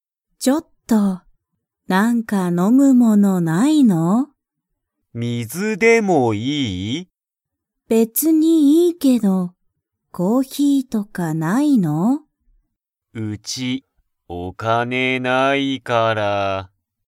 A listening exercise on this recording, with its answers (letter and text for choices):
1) キヨシのうちは、____がない。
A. 水(みず)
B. ご飯(はん)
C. 本(ほん)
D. お金(かね)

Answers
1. D. お金(かね)

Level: Level 1